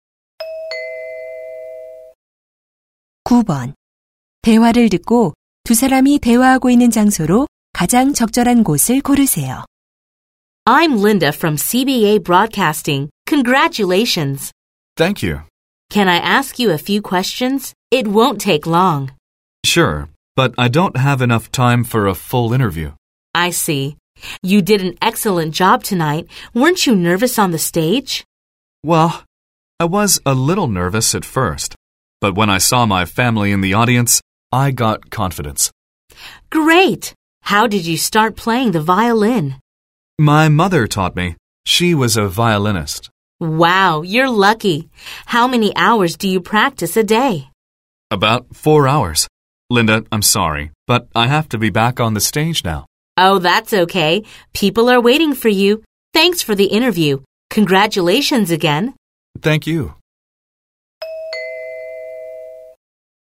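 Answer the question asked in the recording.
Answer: 연주회장 (무대 뒤)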